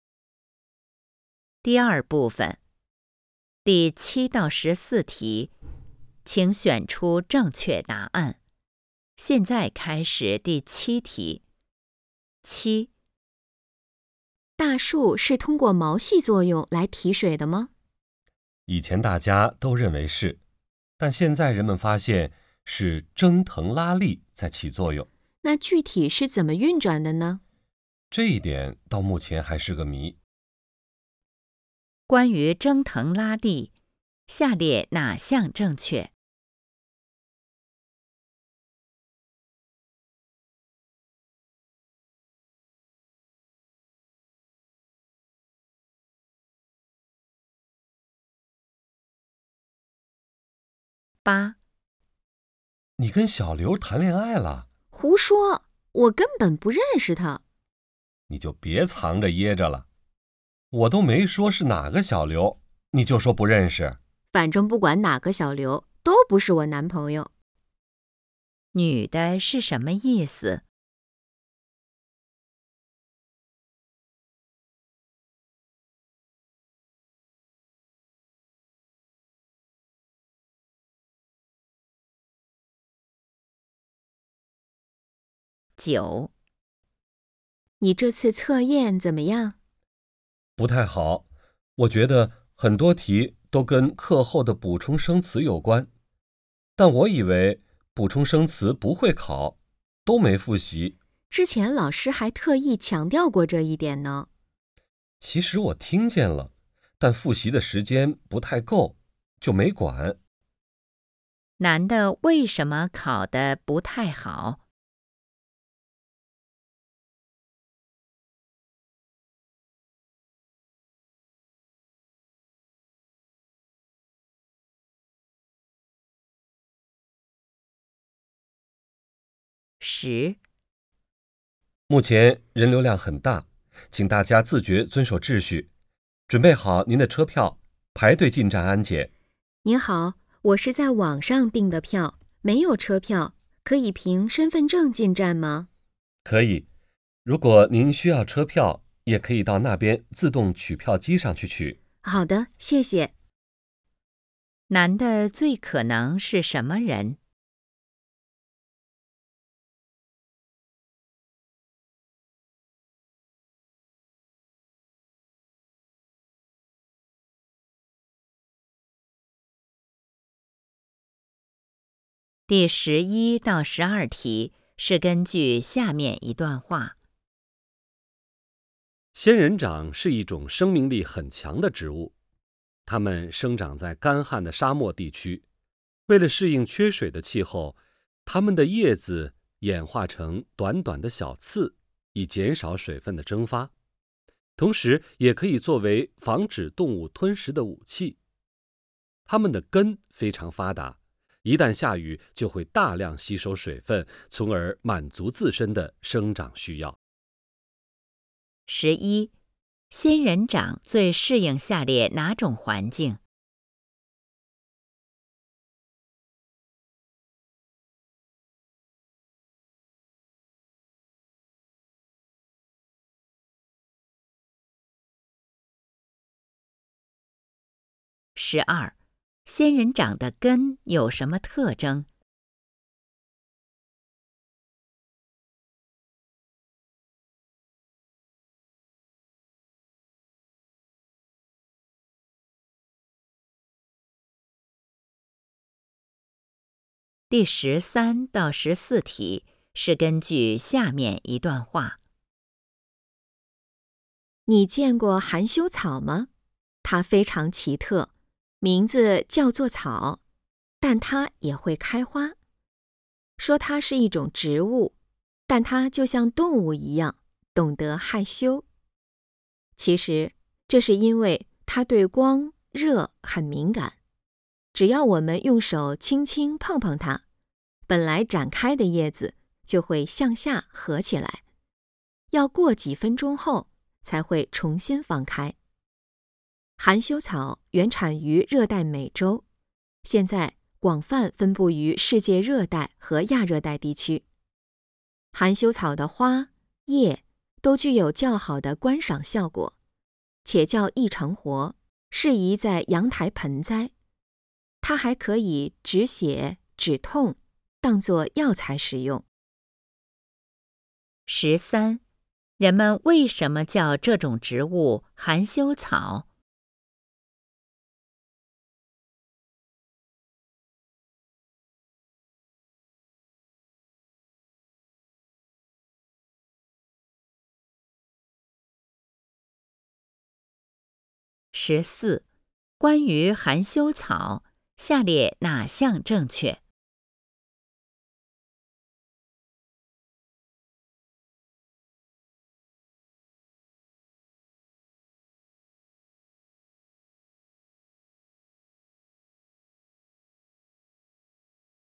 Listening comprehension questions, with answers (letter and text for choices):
第7-14题:请选择出正确答案。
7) 关于蒸腾拉力,下列哪项正确?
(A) 就是毛细作用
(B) 可以保护树叶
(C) 帮助大树提水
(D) 人们完全了解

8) 女的是什么意思?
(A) 她跟小刘不熟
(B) 他们只是朋友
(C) 小刘胡说八道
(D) 她没有谈恋爱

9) 男的为什么考得不太好?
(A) 题目太难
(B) 没有复习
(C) 生词没掌握好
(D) 考试时间不够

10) 男的最可能是什么人?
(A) 秘书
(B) 模特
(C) 列车员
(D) 车站工作人员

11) 仙人掌最适应下列哪种环境?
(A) 沙漠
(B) 海岛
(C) 池塘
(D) 雨林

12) 仙人掌的根有什么特征?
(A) 可以变成小刺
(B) 减少水分流失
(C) 防止动物吞食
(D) 大量吸收水分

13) 人们为什么叫这种植物"含羞草"?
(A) 它会开花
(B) 它很敏感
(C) 它有感情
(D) 人们喜欢它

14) 关于含羞草, 下列哪项正确?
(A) 是一种动物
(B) 只有美洲有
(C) 不容易种活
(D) 有药用价值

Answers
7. (C) 帮助大树提水
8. (D) 她没有谈恋爱
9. (C) 生词没掌握好
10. (D) 车站工作人员
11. (A) 沙漠
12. (D) 大量吸收水分
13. (B) 它很敏感
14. (D) 有药用价值

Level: HSK 5